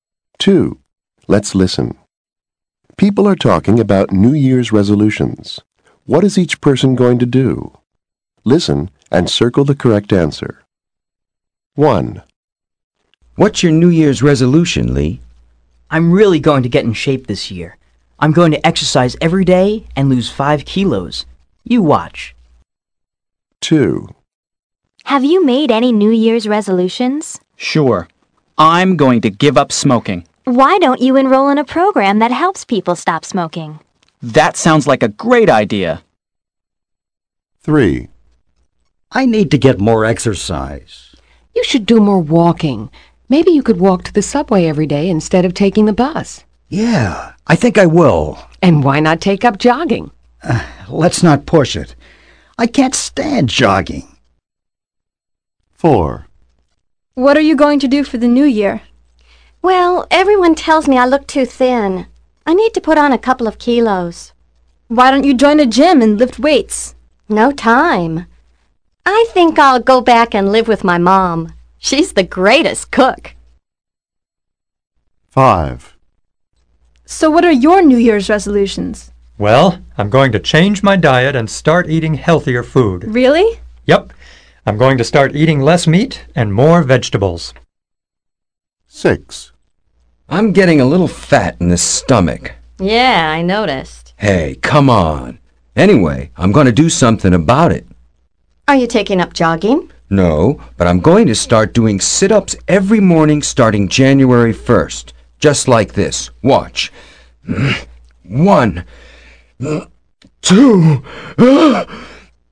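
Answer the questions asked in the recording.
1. Exercise every day and lose 5 kilos
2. Give up smoking
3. Walk to the subway every day
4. Put on weight by living with his mom
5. Eat healthier food: less meat, more vegetables
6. Do sit-ups every morning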